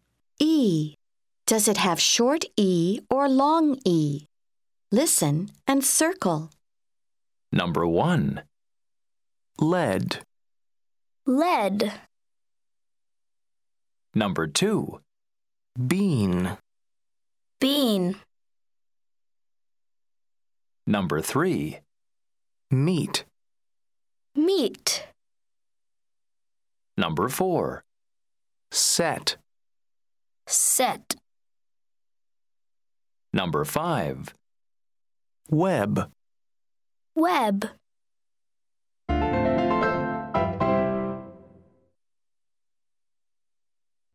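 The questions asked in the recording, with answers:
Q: Bean.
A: long E

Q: Meat.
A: long E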